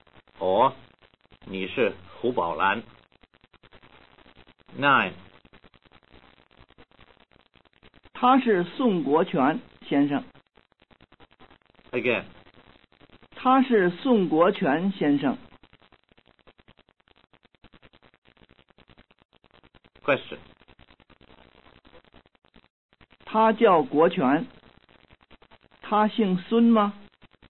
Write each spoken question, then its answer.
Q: 他叫国权。他姓孙吗?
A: 他不姓孙,他姓宋。